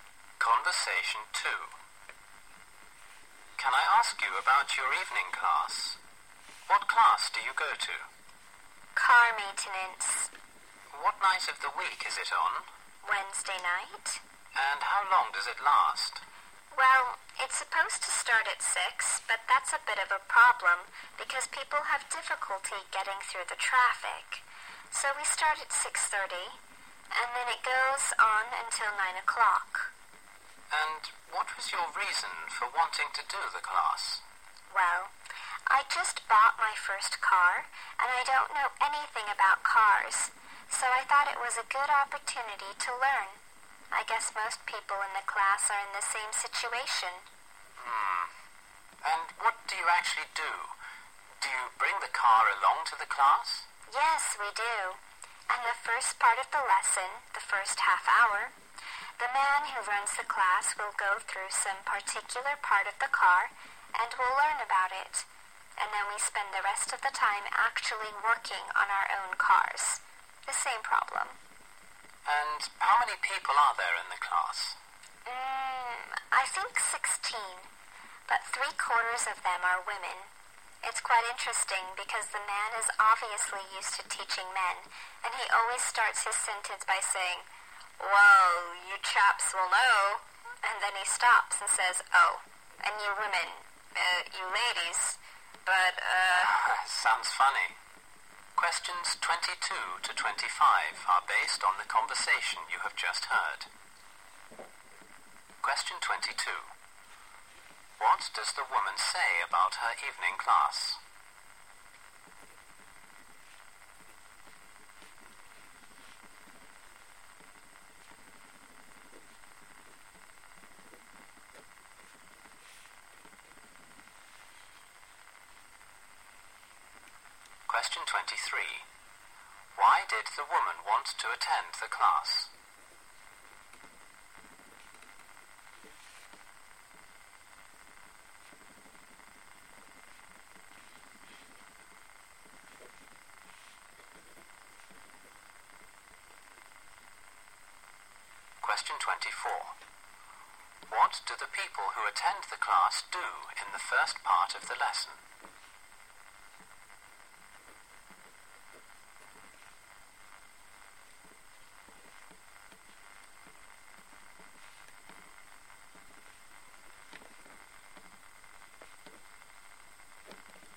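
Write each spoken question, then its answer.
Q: Why did the woman want to attend the class?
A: She had just bought her first car and knew nothing about cars.

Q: What do the people who attend the class do in the first part of the lesson?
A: Learn about a particular part of the car from the instructor.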